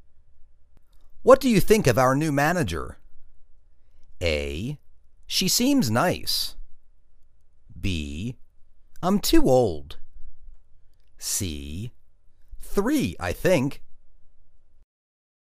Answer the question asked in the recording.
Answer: She seems nice.